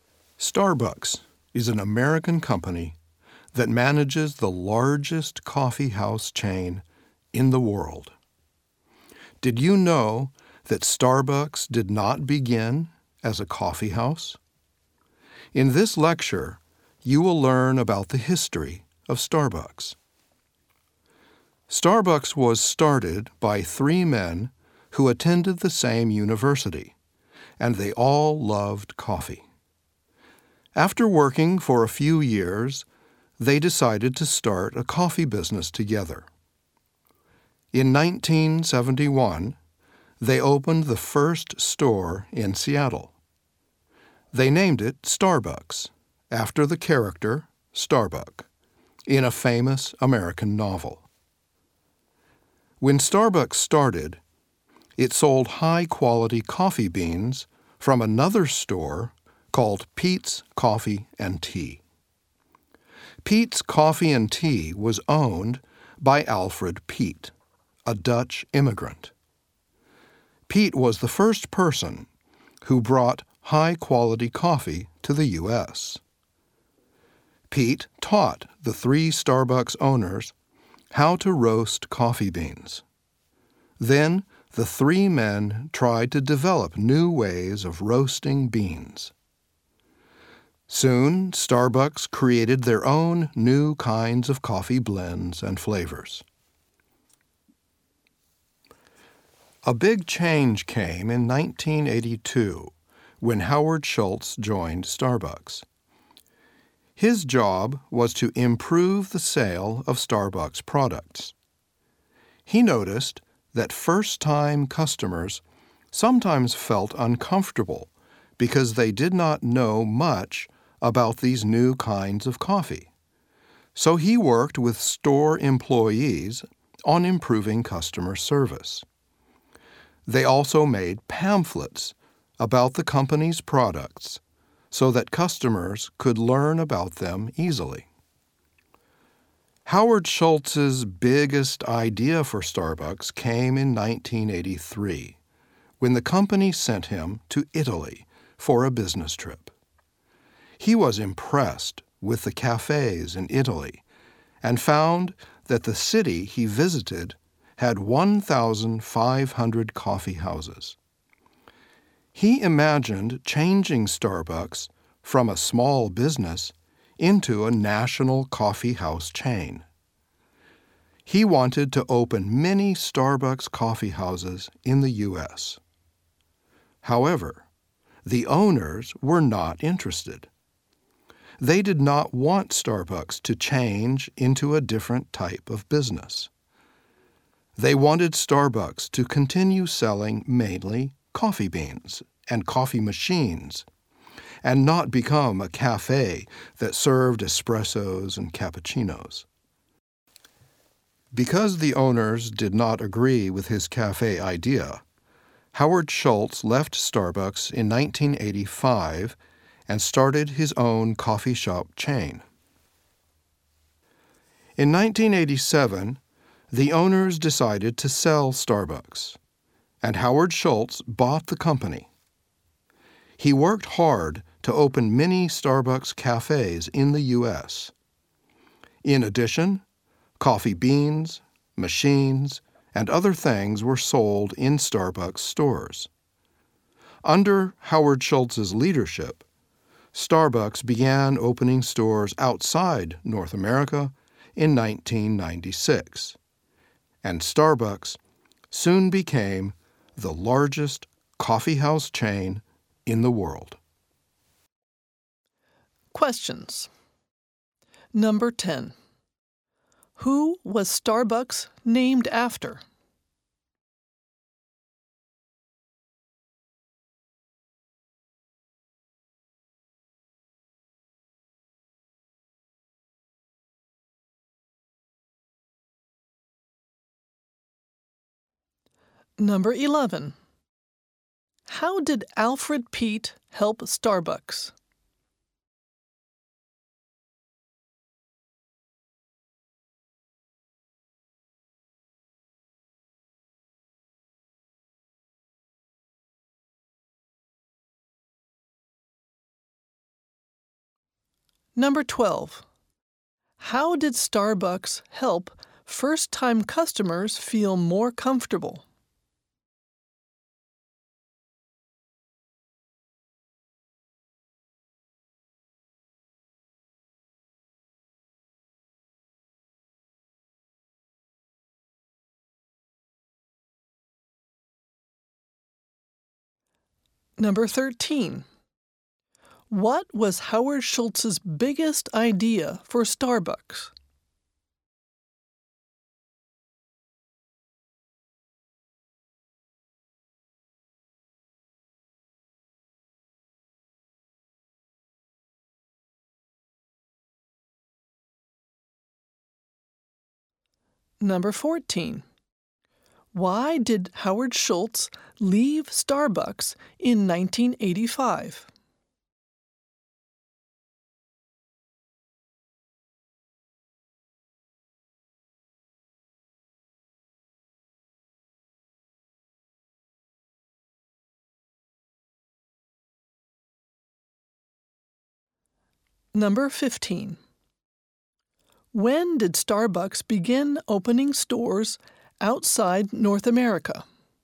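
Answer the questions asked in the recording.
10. Starbuck, a character in a famous American novel
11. He taught the owners how to roast coffee beans.
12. By improving customer service and making pamphlets about its products
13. To make it a national coffee house chain
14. The owners did not agree with his cafe idea.
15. In 1996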